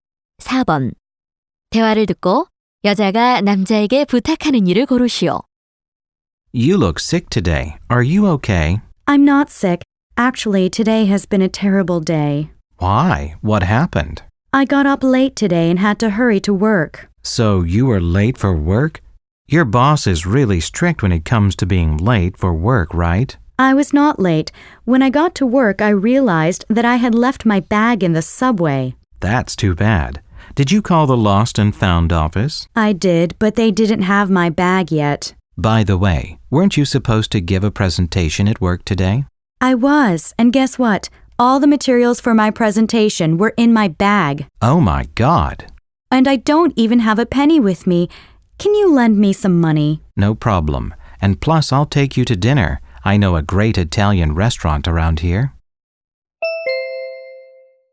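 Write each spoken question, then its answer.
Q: 대화를 듣고 여자가 남자에게 부탁하는 일을 고르시오.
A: 돈을 빌려 달라고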